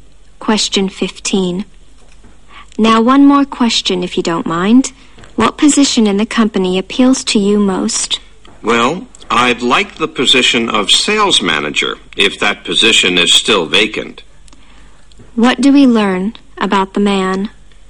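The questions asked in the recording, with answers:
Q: What do we learn about the man?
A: He is applying for the sales manager position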